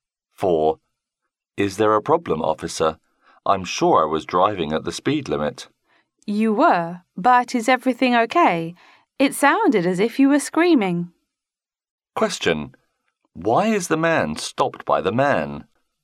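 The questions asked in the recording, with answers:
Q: Why is the man stopped by the man?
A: It sounded as if he was screaming, so the officer wanted to check he was okay.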